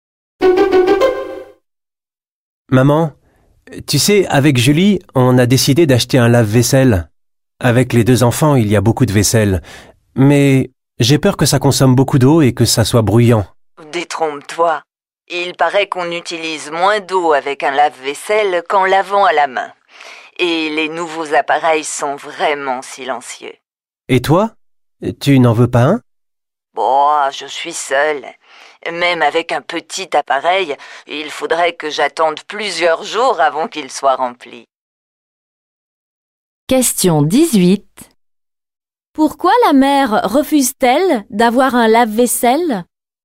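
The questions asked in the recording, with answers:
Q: Pourquoi la mère refuse-t-elle d'avoir un lave-vaisselle?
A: Elle vit seule et il faudrait plusieurs jours pour le remplir.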